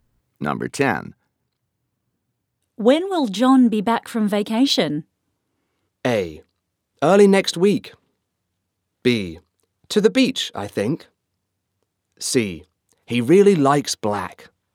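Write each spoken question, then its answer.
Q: When will John be back from vacation?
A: A: Early next week.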